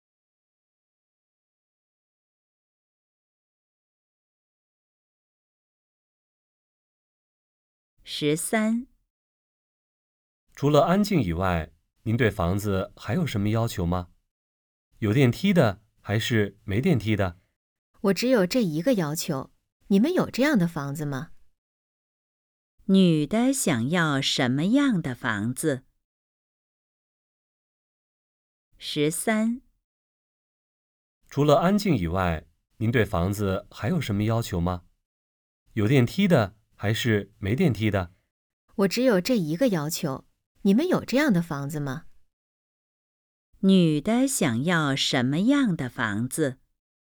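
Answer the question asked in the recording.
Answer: 安静的房子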